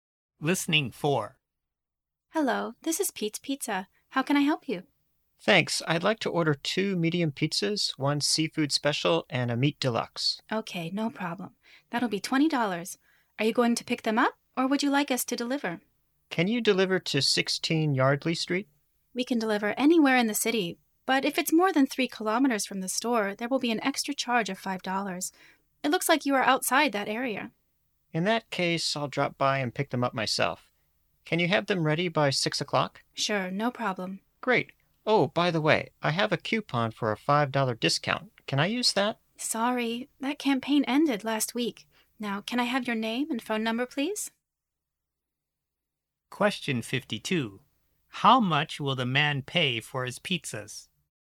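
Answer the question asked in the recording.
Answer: $20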